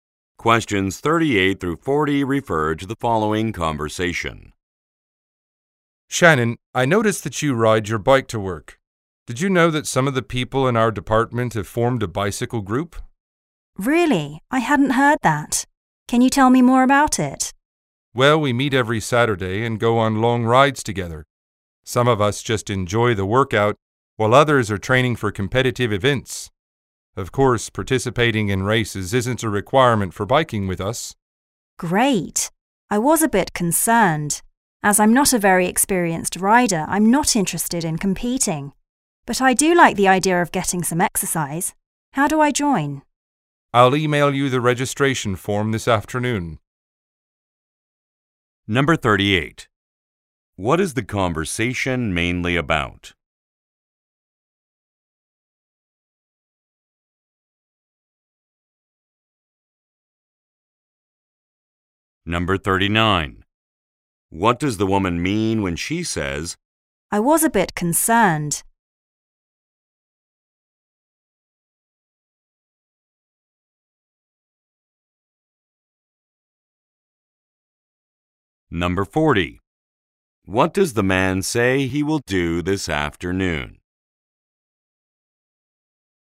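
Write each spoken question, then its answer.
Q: What is the conversation mainly about?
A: A bicycle group

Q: "I was a bit concerned"?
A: She worried racing was required

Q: What does the man say he will do this afternoon?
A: Email her the registration form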